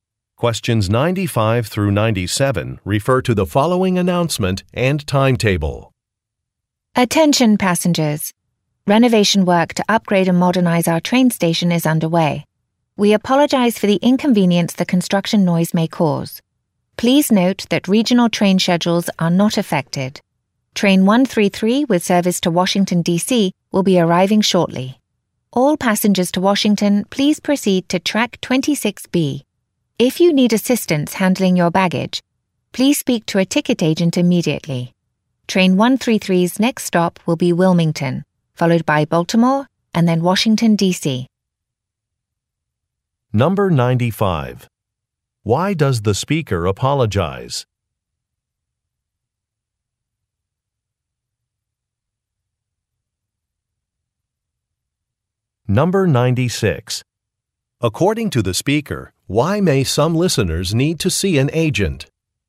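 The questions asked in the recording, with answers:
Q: Why does the speaker apologize?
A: For construction noise from the station renovation

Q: According to the speaker, why may some listeners need to see an agent?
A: If they need help handling their baggage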